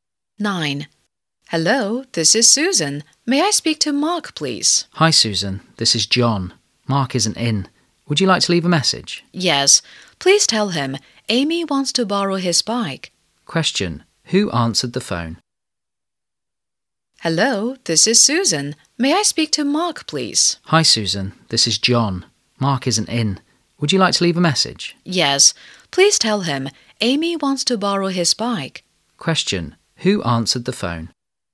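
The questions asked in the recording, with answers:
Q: Question. Who answered the phone?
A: John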